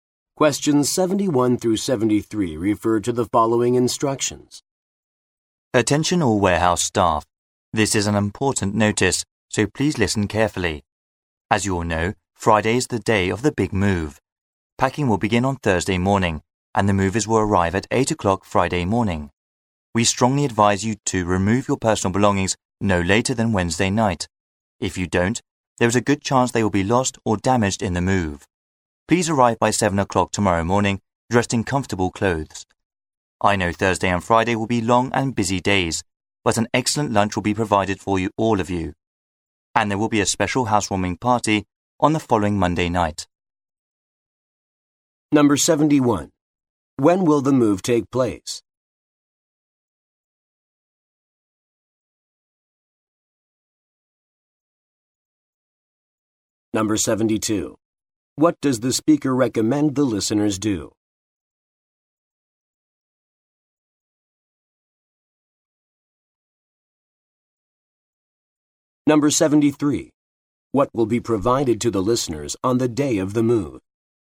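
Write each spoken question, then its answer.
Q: When will the move take place?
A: On Friday

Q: What does the speaker recommend the listeners do?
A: Remove their personal belongings by Wednesday night

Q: What will be provided to the listeners on the day of the move?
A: Lunch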